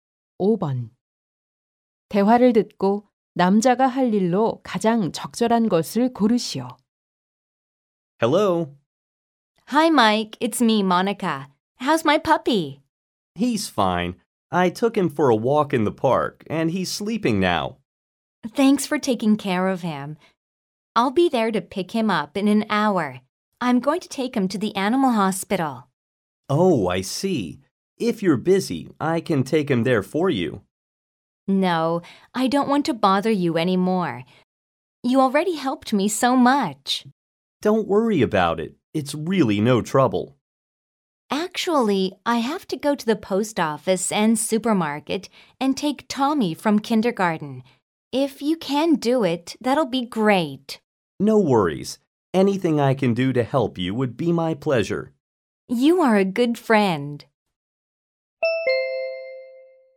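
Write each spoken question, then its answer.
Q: 대화를 듣고 남자가 할 일로 가장 적절한 것을 고르시오.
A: 강아지를 동물병원에 데려가기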